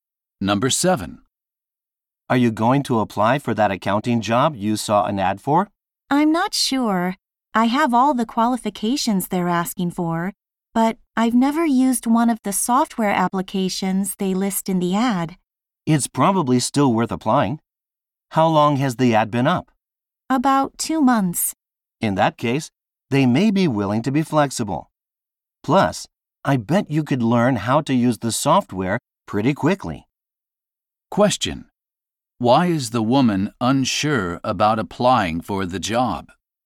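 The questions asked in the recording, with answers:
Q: Why is the woman unsure about applying for the job?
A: She has never used one of the software applications listed.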